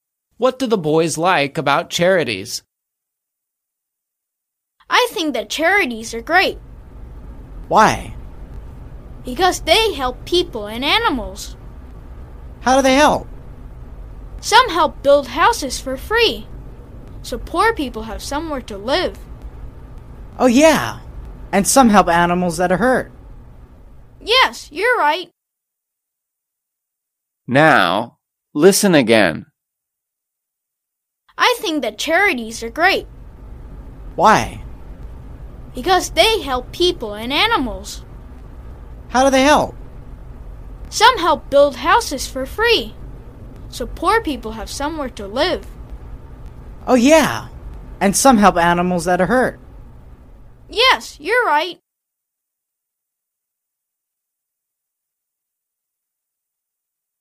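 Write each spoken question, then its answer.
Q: What do the boys like about charities?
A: They help people and animals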